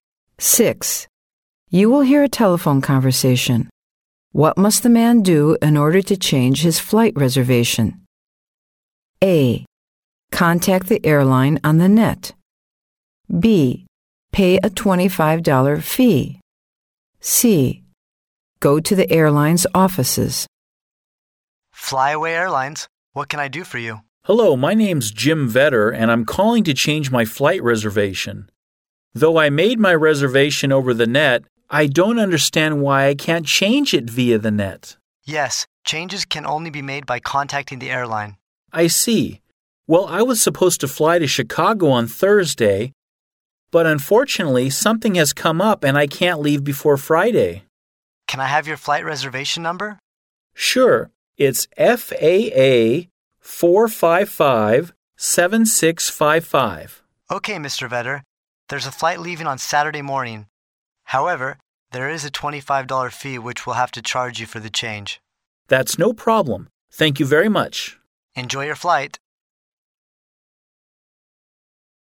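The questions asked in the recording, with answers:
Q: What must the man do in order to change his flight reservation?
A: B: Pay a $25 fee.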